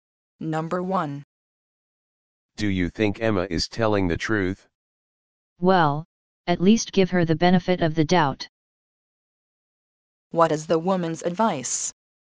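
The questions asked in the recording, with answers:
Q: What is the woman's advice?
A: To give Emma the benefit of the doubt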